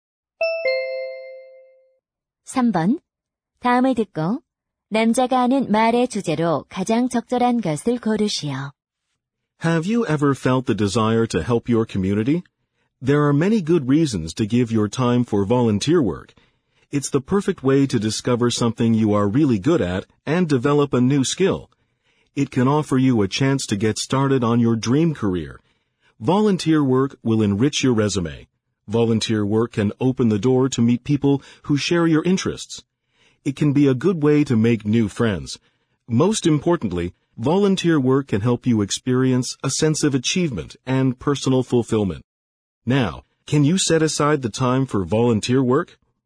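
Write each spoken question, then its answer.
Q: 다음을 듣고 남자가 하는 말의 주제로 가장 적절한 것을 고르시오.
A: 자원봉사 활동의 이점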